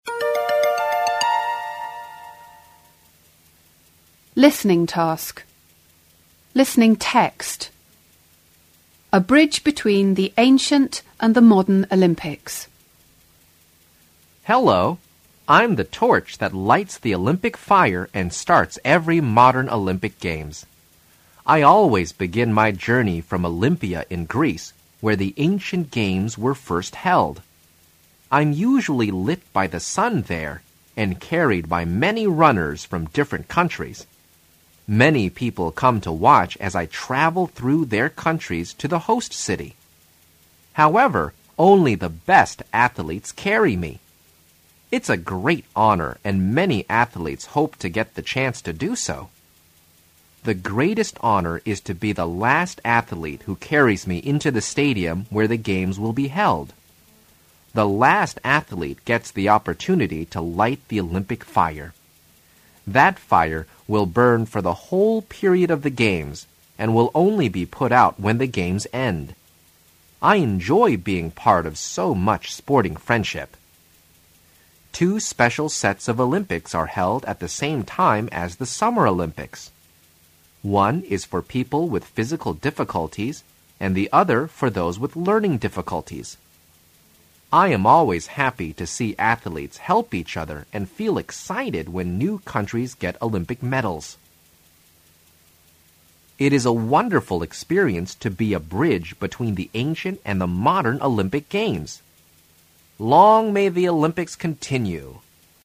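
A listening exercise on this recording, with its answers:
Listen to the tape and take notes. Then discuss the questions with your partner.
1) Why does the torch begin its journey in Greece?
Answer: Because the ancient Games were first held in Olympia, Greece.

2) Why are there Special Olympic Games?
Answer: They are for people with physical difficulties and people with learning difficulties.

Before listening, try to put these sentences in order. Then listen to the tape and make any corrections to your list. The first one is done for you.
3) I am happy when new countries ...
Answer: 7

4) I travel through many countries ...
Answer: 2

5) The sun lights me.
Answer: 1

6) I will burn till the end of the OG.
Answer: 6

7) I am proud to be a bridge between...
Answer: 8

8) The greatest honour is for the last ...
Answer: 4

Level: 高中英语必修二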